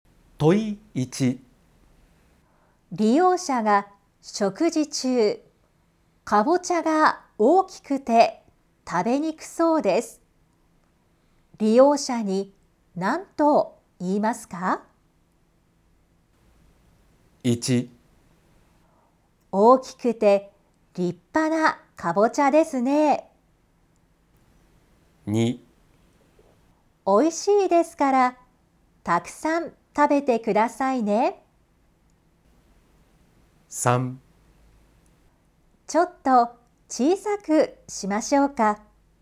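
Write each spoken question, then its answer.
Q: 利用者に何と言いますか?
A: 3: ちょっと小さくしましょうか。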